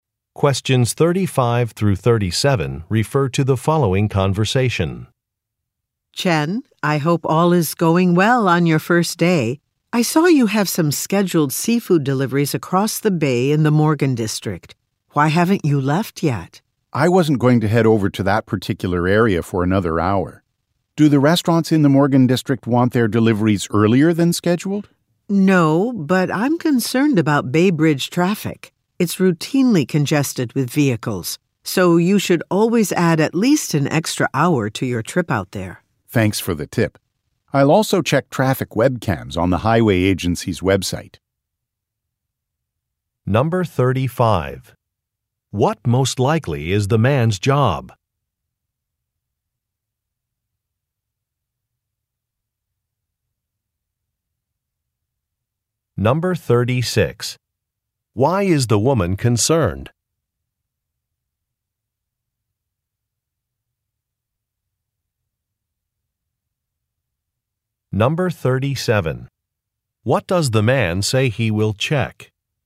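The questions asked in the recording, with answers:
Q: What most likely is the man's job?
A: Delivery driver (seafood deliveries)

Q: Why is the woman concerned?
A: Traffic on the Bay Bridge is routinely congested

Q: What does the man say he will check?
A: Traffic webcams on the highway agency's website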